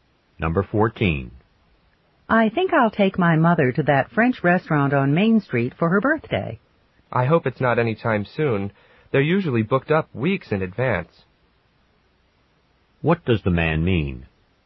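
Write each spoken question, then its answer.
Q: What does the man mean?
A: She needs to make a reservation well ahead of time.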